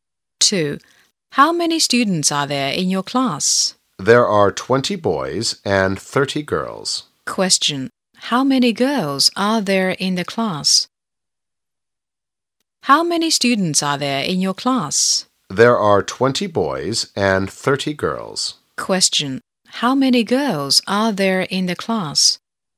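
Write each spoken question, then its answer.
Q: How many girls are there in the class?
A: 30 girls.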